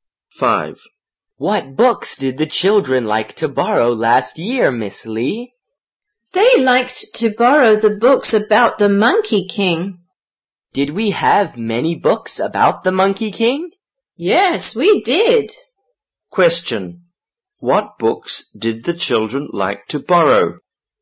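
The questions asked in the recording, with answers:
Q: What books did the children like to borrow?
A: Books about the Monkey King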